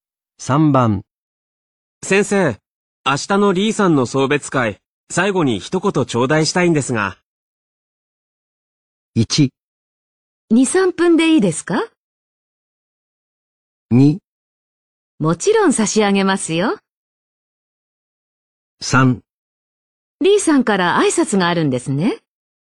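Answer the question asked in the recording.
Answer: 1: 2、3分でいいですか?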